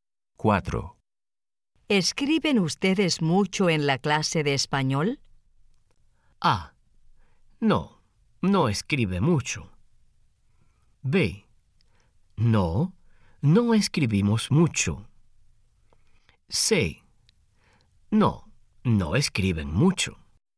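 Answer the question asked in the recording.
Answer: B: No, no escribimos mucho.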